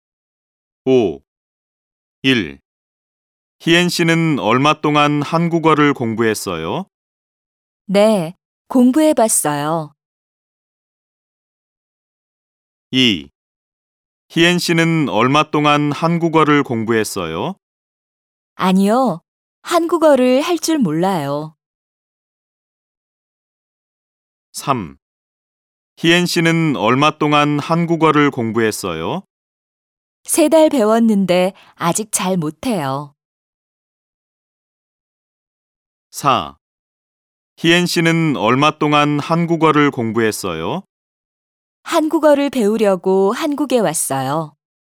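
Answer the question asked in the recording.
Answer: 3: 세 달 배웠는데 아직 잘 못해요.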